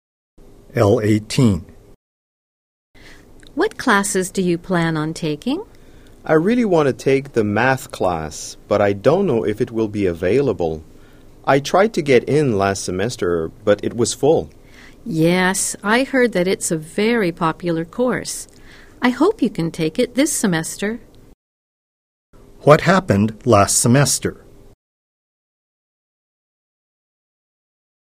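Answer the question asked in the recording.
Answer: The math class was full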